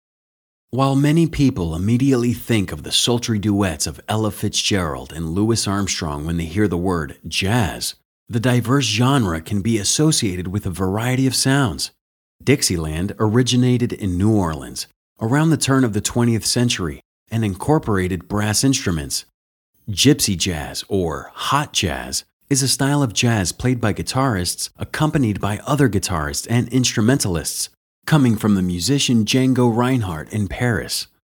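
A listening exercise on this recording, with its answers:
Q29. What is the main idea of the audio passage?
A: Jazz is a term that can describe many sub-genres.

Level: C1 Advanced English Test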